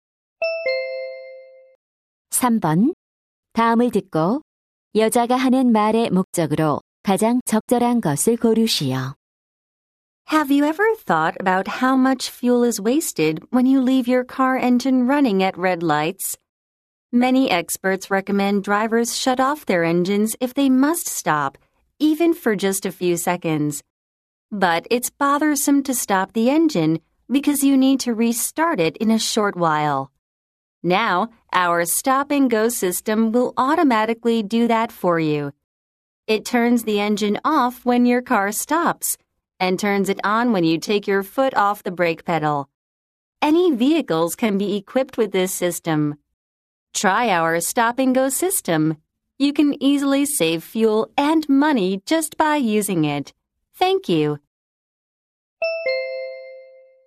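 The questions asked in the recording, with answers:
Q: 다음을 듣고 여자가 하는 말의 목적으로 가장 적절한 것을 고르시오.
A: 연료를 절약해 주는 자동 시동 정지(stop-and-go) 시스템을 홍보하려고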